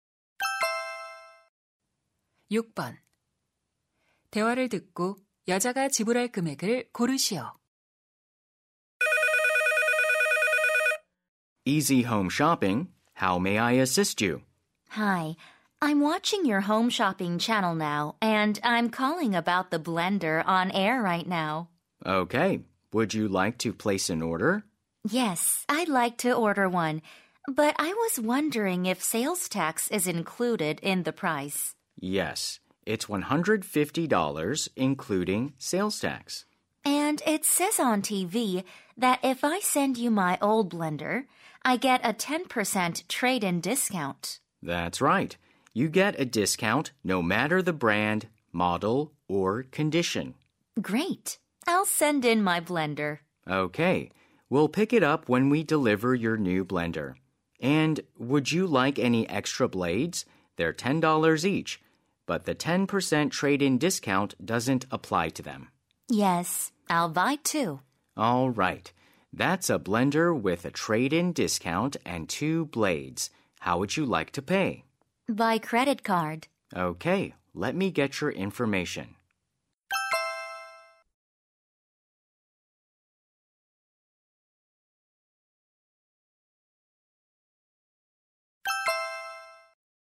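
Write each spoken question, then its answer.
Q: 대화를 듣고 여자가 지불할 금액을 고르시오.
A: $155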